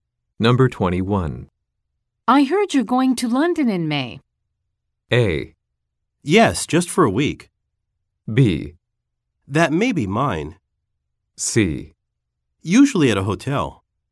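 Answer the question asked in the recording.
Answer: A: Yes, just for a week.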